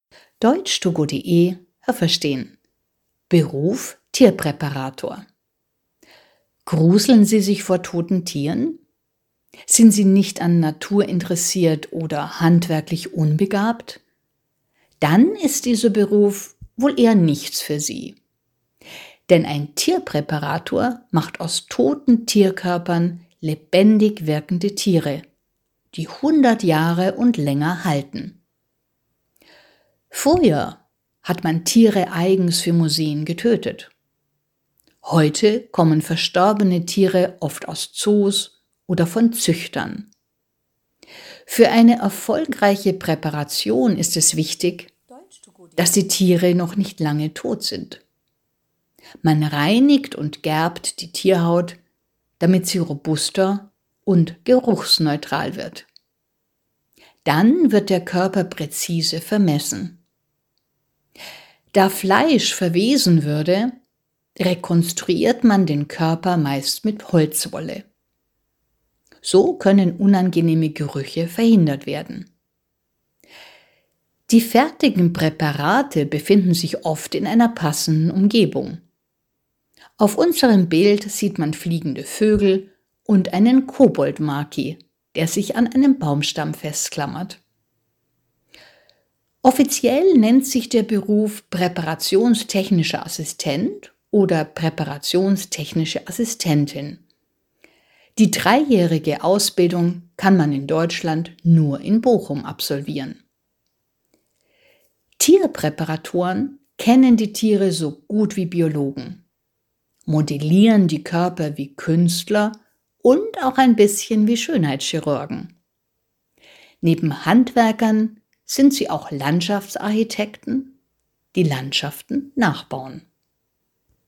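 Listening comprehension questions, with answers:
Welches Verb passt?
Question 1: Viele _____ vor toten Tieren.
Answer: gruseln sich

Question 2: Präparierte Tierkörper _____100 Jahre und länger.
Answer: halten

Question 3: Das Fleisch eines toten Tieres würde _____.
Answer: verwesen

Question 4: Der Tierkörper wird mit Holzwolle _____.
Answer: rekonstruiert

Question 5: Der Koboldmaki _____ an einem Baumstamm fest.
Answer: klammert sich

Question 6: Tierpräparatoren sind wie Künstler, die einen Körper _____.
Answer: modellieren

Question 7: Tierpräparatoren sind auch Landschaftsarchitekten, die Landschaften _____.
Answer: nachbauen

Haben Sie das gehört? Stimmt diese Aussage?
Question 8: Wer Tierpräparator werden möchte, muss gute handwerkliche Fähigkeiten haben.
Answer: richtig

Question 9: Bei der Tierpräparation werden Tiere seit hundert Jahren naturgetreu nachgestaltet.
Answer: falsch

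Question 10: Für eine gute Präparation spielt es keine Rolle, wie lange das Tier schon tot ist.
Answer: falsch

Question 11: Die Tierhaut wird gegerbt, damit sie stabil wird und nicht mehr stinkt.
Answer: richtig

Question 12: Das Fleisch des Tierkörpers wird ebenfalls gegerbt, damit es nicht unangenehm riecht.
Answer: falsch

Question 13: Fertige Tierpräparate werden oft in einer Umgebung platziert, die zu dem Tier passt.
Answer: richtig

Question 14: In Deutschland kann man nur in Bonn lernen, wie man Tiere präpariert.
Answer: falsch

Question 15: Tierpräparatoren sind Biologen, Künstler, Handwerker und Landschaftsarchitekten in einem.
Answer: richtig

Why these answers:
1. Die Alternative wäre: Vielen graut es vor toten Tieren.
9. Tiere werden naturgetreu nachgestaltet und sie halten mehr als 100 Jahre. Im Audio wird nicht erwähnt, wie lange man schon Tiere präpariert.
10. Für eine erfolgreiche Präparation ist es wichtig, dass das Tier noch nicht lange tot ist.
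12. Das Fleisch würde verwesen. Deshalb rekonstruiert man den Körper mit Holzwolle.
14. Man kann das nur in Bochum lernen. (Bonn und Bochum liegen beide in Nordrhein-Westfalen.)

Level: C1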